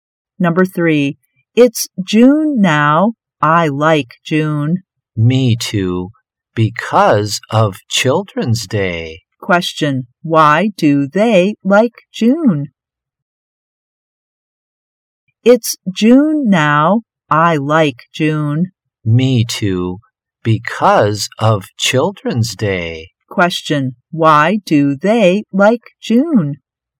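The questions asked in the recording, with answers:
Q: Why do they like June?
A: Because of Children's Day.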